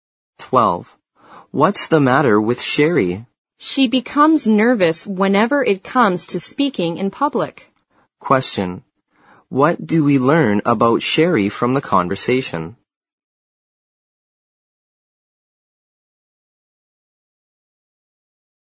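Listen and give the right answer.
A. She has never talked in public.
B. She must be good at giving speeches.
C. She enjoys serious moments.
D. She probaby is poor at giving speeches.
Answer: D. She probaby is poor at giving speeches.

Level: 四级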